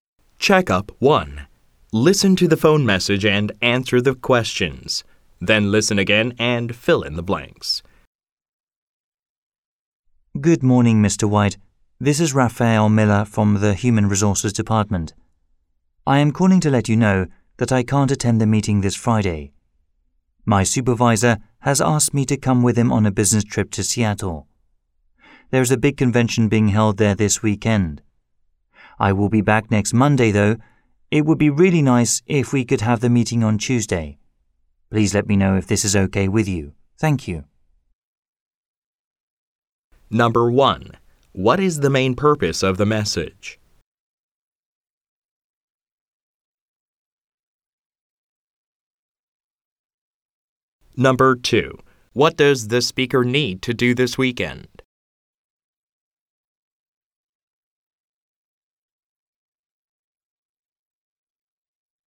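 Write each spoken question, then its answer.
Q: What is the main purpose of the message?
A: To say he can't attend Friday's meeting and ask to move it to Tuesday

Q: What does the speaker need to do this weekend?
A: Go on a business trip to a convention in Seattle with his supervisor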